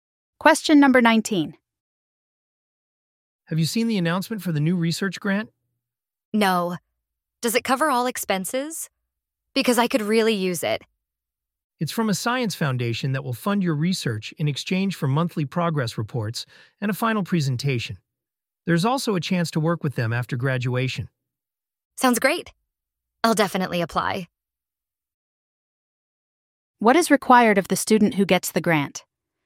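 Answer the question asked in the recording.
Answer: Monthly progress reports and a final presentation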